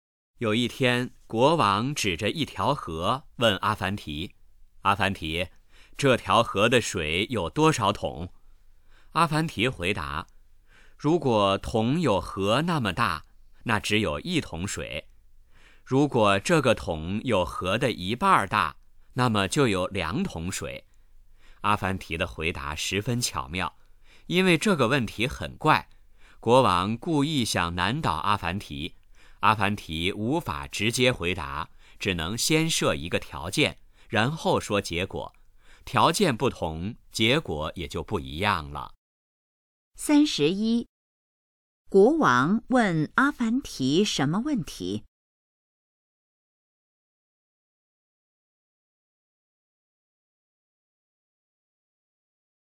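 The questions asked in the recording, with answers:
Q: 国王问阿凡提什么问题?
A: 这条河的水有多少桶

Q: 国王为什么问阿凡提那个问题?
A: 故意想难倒阿凡提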